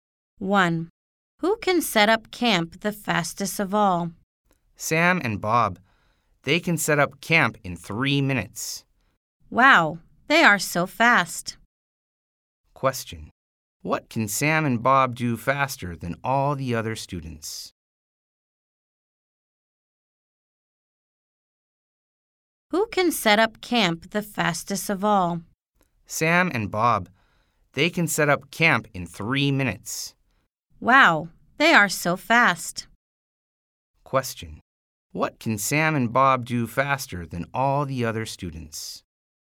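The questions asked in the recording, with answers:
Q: What can Sam and Bob do faster than all the other students?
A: Set up camp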